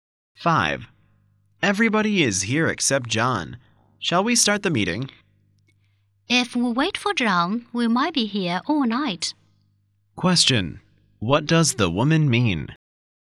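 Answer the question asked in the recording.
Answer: They should start the meeting without waiting for John.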